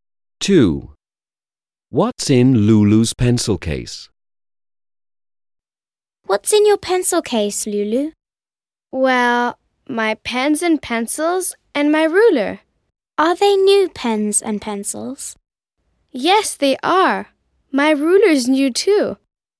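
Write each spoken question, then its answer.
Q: What's in Lulu's pencil case?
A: Her pens, pencils and ruler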